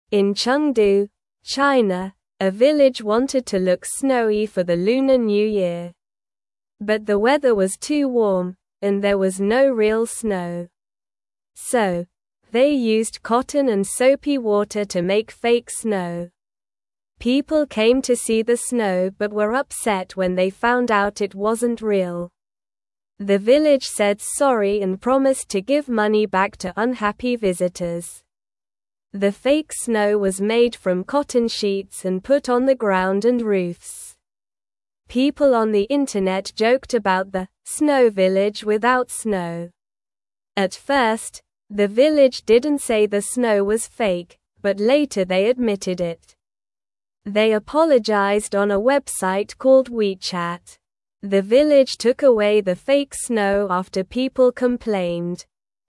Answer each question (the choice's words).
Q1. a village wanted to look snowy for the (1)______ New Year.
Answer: Lunar

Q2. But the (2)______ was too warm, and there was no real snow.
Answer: weather

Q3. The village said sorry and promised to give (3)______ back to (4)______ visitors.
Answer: money

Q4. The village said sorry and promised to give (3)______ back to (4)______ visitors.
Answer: unhappy

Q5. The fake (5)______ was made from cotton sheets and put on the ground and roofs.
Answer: snow

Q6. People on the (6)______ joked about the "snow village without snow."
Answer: internet

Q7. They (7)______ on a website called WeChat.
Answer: apologized

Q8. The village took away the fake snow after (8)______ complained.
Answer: people

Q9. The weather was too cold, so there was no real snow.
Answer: False

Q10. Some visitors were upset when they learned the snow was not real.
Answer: True

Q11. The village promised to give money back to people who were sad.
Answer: True

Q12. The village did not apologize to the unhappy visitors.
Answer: False

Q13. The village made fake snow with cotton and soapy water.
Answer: True

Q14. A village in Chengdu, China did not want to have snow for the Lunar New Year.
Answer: False

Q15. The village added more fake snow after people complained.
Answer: False

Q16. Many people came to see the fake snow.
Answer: True

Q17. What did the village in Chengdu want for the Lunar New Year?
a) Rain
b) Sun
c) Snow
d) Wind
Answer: Snow

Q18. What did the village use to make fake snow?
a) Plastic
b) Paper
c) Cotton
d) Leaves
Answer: Cotton

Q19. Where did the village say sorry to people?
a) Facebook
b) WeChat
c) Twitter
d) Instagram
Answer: WeChat

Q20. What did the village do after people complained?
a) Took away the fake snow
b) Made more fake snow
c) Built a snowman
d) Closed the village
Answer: Took away the fake snow

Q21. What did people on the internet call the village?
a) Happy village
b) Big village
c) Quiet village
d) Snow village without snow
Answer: Snow village without snow

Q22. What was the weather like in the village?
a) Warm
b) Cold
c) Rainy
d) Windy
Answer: Warm

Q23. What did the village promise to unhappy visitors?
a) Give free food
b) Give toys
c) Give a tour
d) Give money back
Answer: Give money back

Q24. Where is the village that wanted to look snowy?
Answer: The village is in Chengdu, China.

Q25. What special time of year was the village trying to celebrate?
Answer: The village was trying to celebrate the Lunar New Year.

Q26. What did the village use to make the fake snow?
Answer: The village used cotton and soapy water to make fake snow.

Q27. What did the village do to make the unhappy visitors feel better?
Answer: The village said sorry and promised to give money back to unhappy visitors.

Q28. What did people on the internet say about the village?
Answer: People on the internet joked about the "snow village without snow."

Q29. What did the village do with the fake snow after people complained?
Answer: The village took away the fake snow after people complained.

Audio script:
In Chengdu, China, a village wanted to look snowy for the Lunar New Year. But the weather was too warm, and there was no real snow. So, they used cotton and soapy water to make fake snow. People came to see the snow but were upset when they found out it wasn't real. The village said sorry and promised to give money back to unhappy visitors.
The fake snow was made from cotton sheets and put on the ground and roofs. People on the internet joked about the "snow village without snow." At first, the village didn't say the snow was fake, but later they admitted it. They apologized on a website called WeChat. The village took away the fake snow after people complained.

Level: Level 1